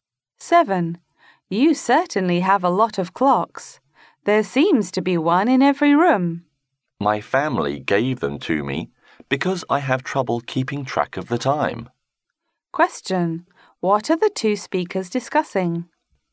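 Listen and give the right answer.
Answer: The man's many clocks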